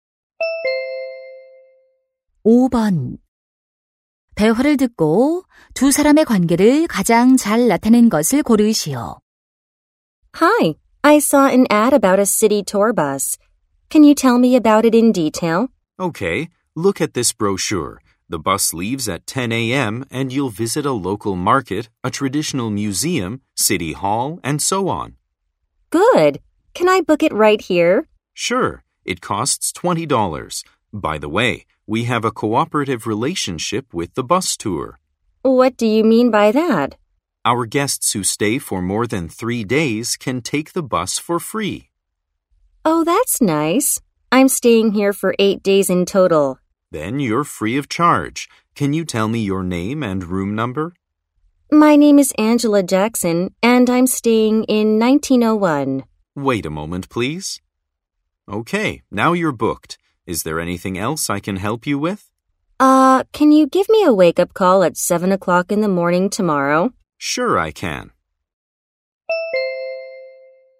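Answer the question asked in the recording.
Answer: 호텔 직원 - 투숙객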